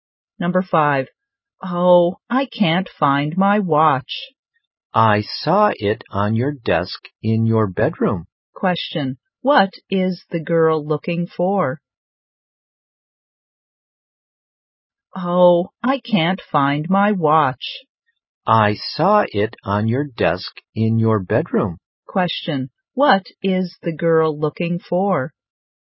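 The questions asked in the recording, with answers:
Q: what is the girl looking for?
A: Her watch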